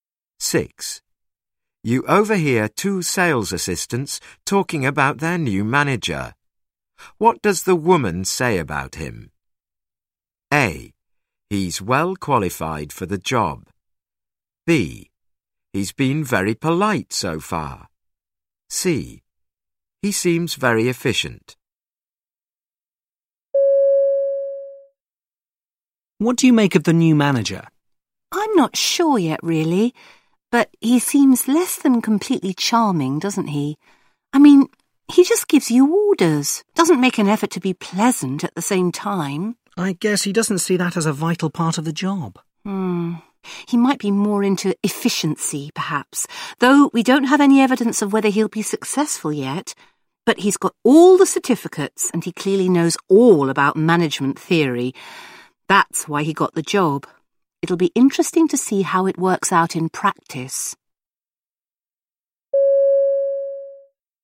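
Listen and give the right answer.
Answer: A: He's well qualified for the job.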